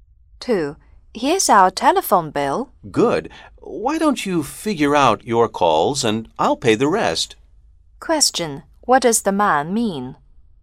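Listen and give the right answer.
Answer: The woman should work out her own calls and he will pay the rest of the bill.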